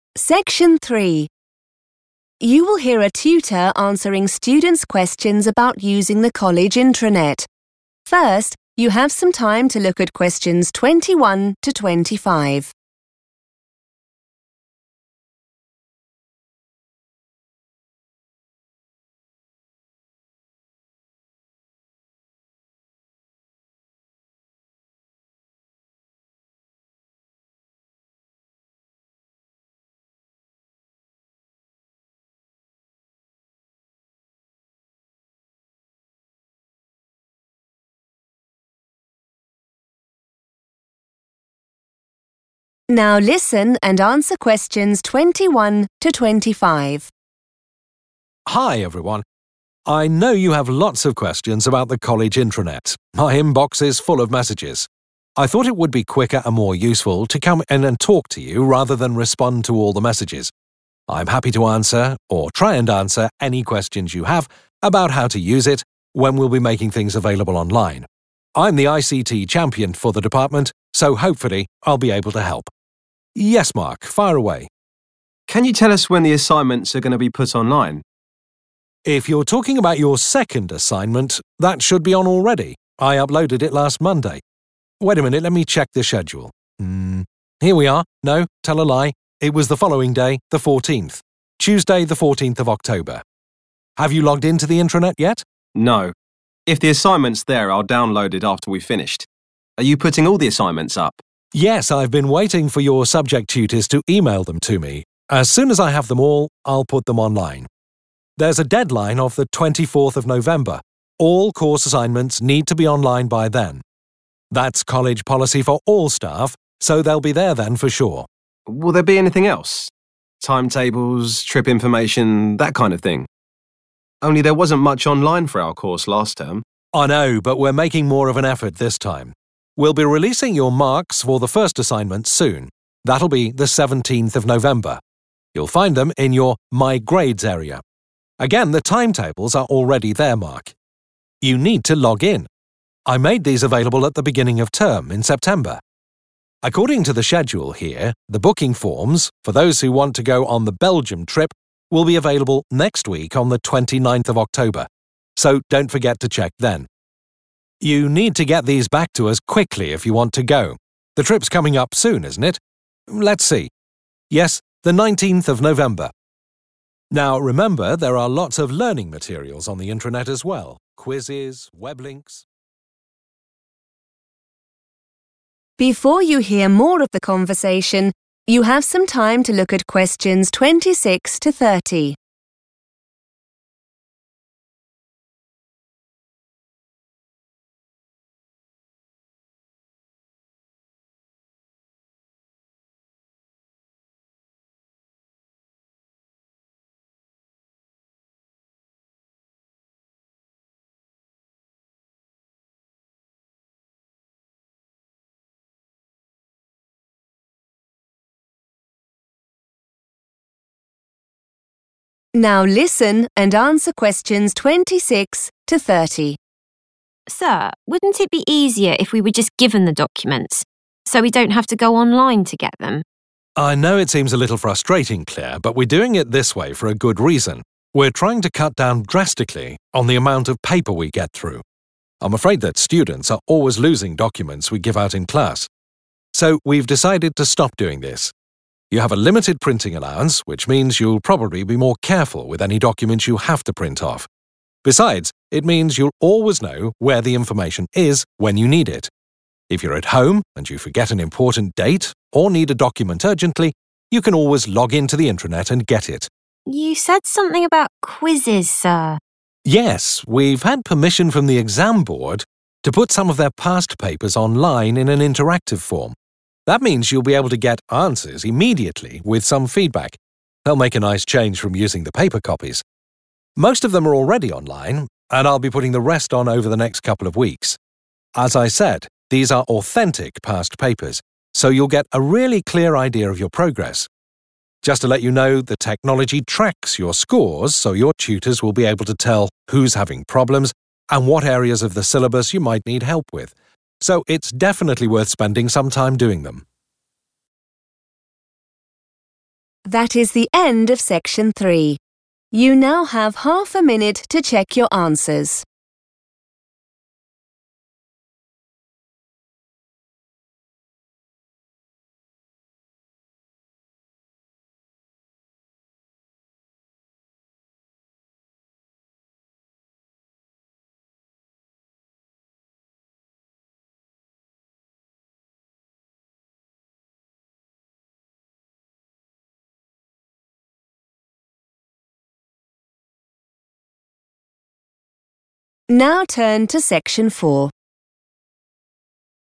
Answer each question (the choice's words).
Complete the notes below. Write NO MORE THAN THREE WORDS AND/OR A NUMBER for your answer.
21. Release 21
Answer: the second assignment / second assignment

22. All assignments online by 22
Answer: 24th November

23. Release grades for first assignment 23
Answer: 17th November

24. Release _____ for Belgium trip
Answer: the booking forms / booking forms

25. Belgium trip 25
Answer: 19th November

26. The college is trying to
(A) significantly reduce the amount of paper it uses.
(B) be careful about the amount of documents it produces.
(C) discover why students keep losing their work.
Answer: significantly reduce the amount of paper it uses.

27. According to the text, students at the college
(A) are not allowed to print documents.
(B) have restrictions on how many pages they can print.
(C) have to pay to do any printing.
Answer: have restrictions on how many pages they can print.

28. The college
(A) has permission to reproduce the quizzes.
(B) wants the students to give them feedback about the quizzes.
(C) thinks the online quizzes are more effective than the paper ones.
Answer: has permission to reproduce the quizzes.

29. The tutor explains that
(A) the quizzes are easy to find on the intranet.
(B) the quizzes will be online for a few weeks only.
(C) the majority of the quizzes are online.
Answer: the majority of the quizzes are online.

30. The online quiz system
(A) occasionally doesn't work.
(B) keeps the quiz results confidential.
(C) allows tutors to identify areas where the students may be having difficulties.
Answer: allows tutors to identify areas where the students may be having difficulties.

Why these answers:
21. The correct answer is identified by matching the date in the notes (October 14th) with the tutor's explanation. The tutor initially thought the second assignment was put online on a Monday, but after checking the schedule, he corrects himself and says it was actually uploaded on Tuesday the 14th of October. In this context, 'putting things available online' or 'uploading' matches the meaning of 'release.'
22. The correct answer is determined by identifying the specific date mentioned by the tutor regarding when everything should be uploaded. The tutor mentions a 'deadline,' which is a synonym for the final date something must be finished or available. She clearly states that this date is the 24th of November for all assignments to be online.
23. The correct answer is 17th November because the tutor clearly says that the marks (which is another word for grades) for the first assignment will be available on that day. The tutor also mentions where to find them, which is in the 'My Grades' section.
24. The correct answer is "booking forms" because the tutor explicitly states that these documents will be made available on the specific date of 29th October for students interested in the Belgium trip. In a schedule or notes context, "release" means making something available to the public or students.
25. The correct answer is 19th November because the tutor explicitly confirms this date while looking at the schedule. The tutor mentions the 'Belgium trip' and subsequently checks the exact date, stating '19th November'. Keywords to note include 'trip' and 'November'.
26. The correct answer is A because the teacher explains the main reason for putting documents online instead of handing them out. The teacher says they want to "cut down drastically" on paper, which means to reduce it by a large amount. This matches the phrase "significantly reduce" in the answer choice. The teacher also mentions that students often lose paper copies, so using the digital intranet helps solve that problem while saving resources.
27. The correct answer is B because the tutor explicitly mentions that students have a 'limited printing allowance'. This term means there is a cap or a specific rule on how much work they can print. This is part of the college's plan to 'cut down' or reduce the use of paper because students often lose papers given to them in class.
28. The correct answer is A because the tutor explicitly states that the college received 'permission' from the 'exam board' to turn old test papers into online activities. This confirms that the college is allowed to use these materials. Words to remember are 'permission', which means being allowed to do something, and 'exam board', which is the organization that creates the tests.
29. The correct answer is C because the tutor states that "most" of the interactive past paper quizzes are already available on the intranet. In English, the word "most" is a synonym for "the majority," which means more than half. The tutor explains that while some are still missing, the largest part of them is already there.
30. The correct answer is C because the tutor explains that the online system saves the students' scores. This information allows the teachers (tutors) to see who is struggling and which parts of the course (syllabus) they need more help to understand. The phrases 'tell who's having problems' and 'what areas... you might need help with' in the text have the same meaning as identifying where students have 'difficulties'.

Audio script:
Tutor: Hi everyone. I know you have lots of questions about the college intranet – my inbox is full of messages! I thought it would be quicker and more useful to come in and talk to you rather than respond to all the messages. I'm happy to answer or try and answer any questions you have – about how to use it, when we'll be making things available online ... I'm the ICT champion for the department so hopefully I'll be able to help. Yes Mark – fire away.
Mark: Can you tell us when the assignments are going to be put online?
Tutor: If you're talking about your second assignment, that should be on already. I uploaded it last Monday .... Wait a minute – let me check the schedule ... Here we are ... No, tell a lie – it was the following day, the 14th, Tuesday 14th October. Have you logged into the intranet yet?
Mark: No. If the assignment's there I'll download it after we've finished. Are you putting all the assignments up?
Tutor: Yes. I've been waiting for your subject tutors to email them to me. As soon as I have them all I'll put them online. There's a deadline of 24th November ... all course assignments need to be online by then. That's college policy for all staff so they'll be there then for sure.
Mark: Will there be anything else? Timetables, trip information ... that kind of thing? Only there wasn't much online for our course last term.
Tutor: I know. But we're making more of an effort this time. We'll be releasing your marks for the first assignment soon – that'll be 17th November. You'll find them in your 'My Grades' area. Again, the timetables are already there, Mark. You need to log in! I made these available at the beginning of term in September. According to the schedule here, the booking forms for those who want to go on the Belgium trip will be available next week on 29th October, so don't forget to check then. You need to get these back to us quickly if you want to go ... the trip's coming up soon, isn't it? Let's see ... yes 19th November. Now, remember there are lots of learning materials on the intranet as well ...
Claire: Sir, wouldn't it be easier if we were just given the documents ... so we don't have to go online to get them?
Tutor: I know it seems a little frustrating Claire but we're doing it this way for a good reason. We're trying to cut down drastically on the amount of paper we get through. I'm afraid that students are always losing documents we give out in class so we've decided to stop doing this. You have a limited printing allowance, which means you'll probably be more careful with any documents you have to print off. Besides, it means you'll always know where the information is when you need it. If you're at home and you forget an important date or need a document urgently you can always log in to the intranet and get it.
Claire: You said something about quizzes sir ...
Tutor: Yes, we've had permission from the exam board to put some of their past papers online in an interactive form. That means you'll be able to get answers immediately with some feedback ... They'll make a nice change from using the paper copies. Most of them are already online and I'll be putting the rest on over the next couple of weeks. As I said, these are authentic past papers so you'll get a really clear idea of your progress. Just to let you know, the technology tracks your scores so your tutors will be able to tell who's having problems and what areas of the syllabus you might need help with, so it's definitely worth spending some time doing them.